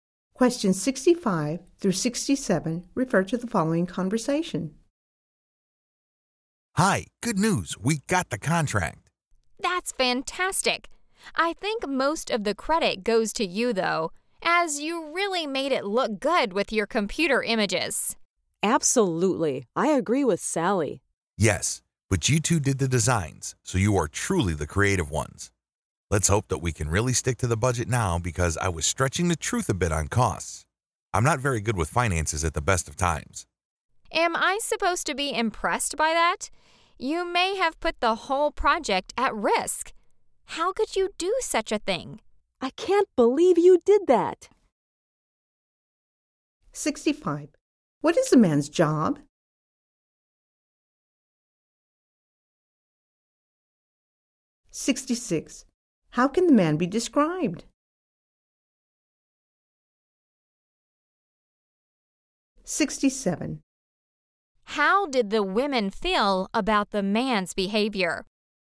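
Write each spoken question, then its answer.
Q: How did the women feel about the man's behavior?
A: Angry and upset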